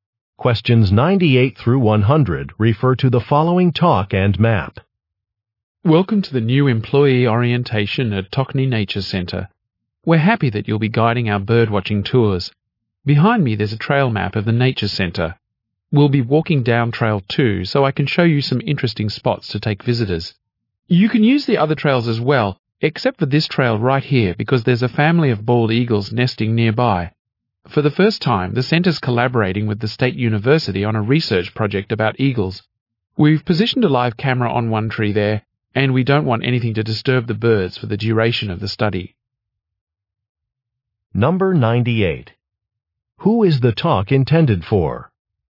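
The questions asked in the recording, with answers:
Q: Who is the talk intended for?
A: New tour guides at the nature center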